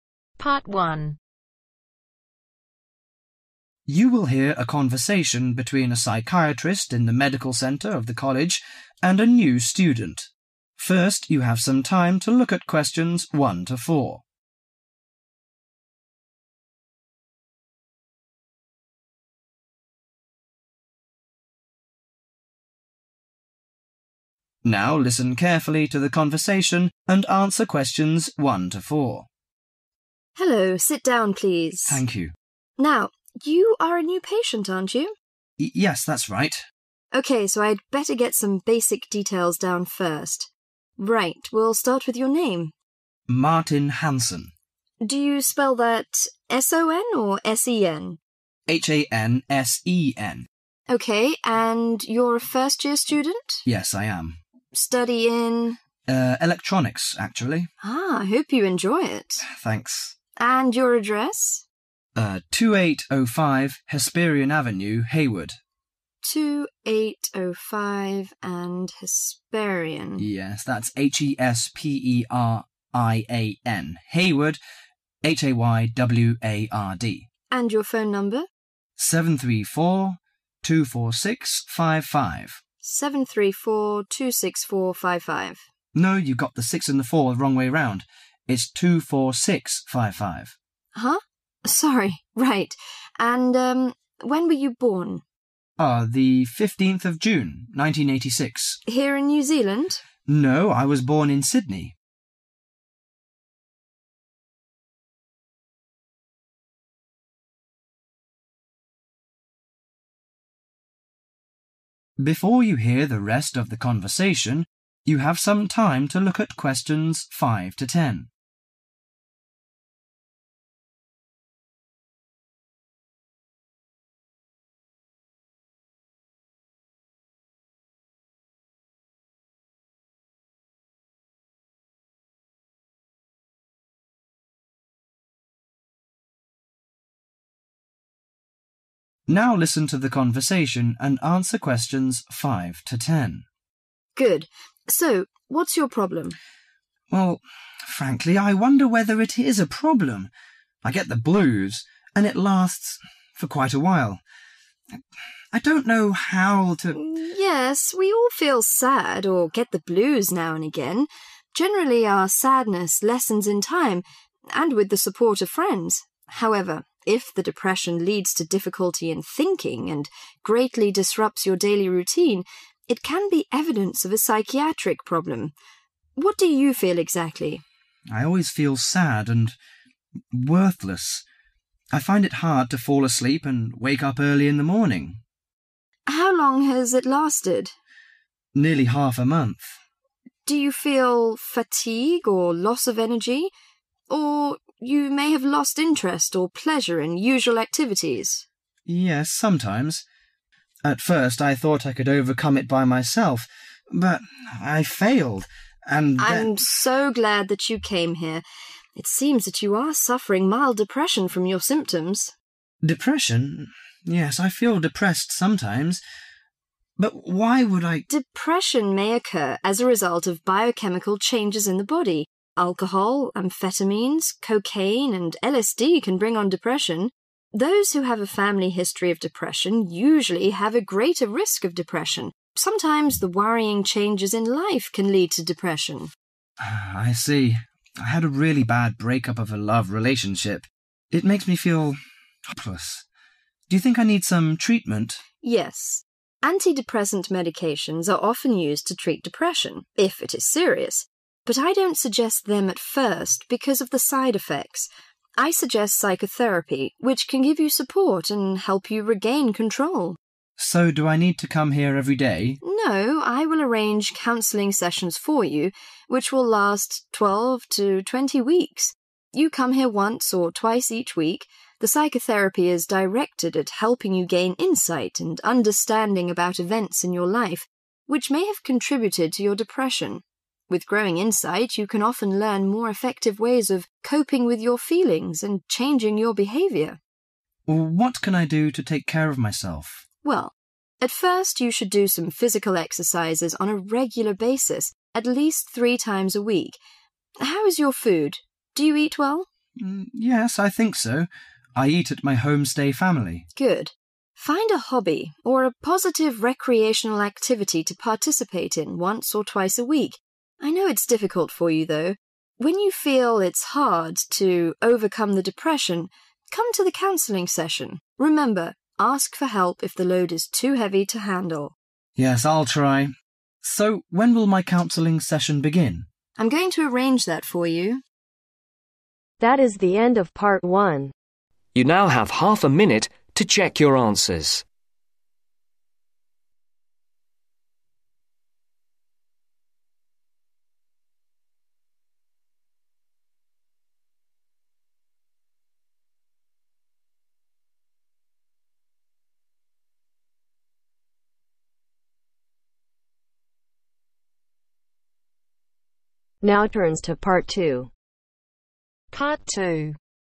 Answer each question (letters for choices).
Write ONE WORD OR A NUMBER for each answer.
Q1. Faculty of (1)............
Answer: Electronics

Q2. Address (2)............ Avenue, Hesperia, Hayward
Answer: 2805

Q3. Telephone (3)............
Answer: 73424655

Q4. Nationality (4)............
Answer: Australian

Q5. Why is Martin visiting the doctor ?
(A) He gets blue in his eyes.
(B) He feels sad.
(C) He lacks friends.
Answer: B

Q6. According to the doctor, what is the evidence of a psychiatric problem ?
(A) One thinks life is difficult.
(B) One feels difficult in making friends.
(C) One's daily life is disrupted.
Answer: C

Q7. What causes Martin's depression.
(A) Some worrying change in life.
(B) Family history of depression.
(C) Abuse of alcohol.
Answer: A

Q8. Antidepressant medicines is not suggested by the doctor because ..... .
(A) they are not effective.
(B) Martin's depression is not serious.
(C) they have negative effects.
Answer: C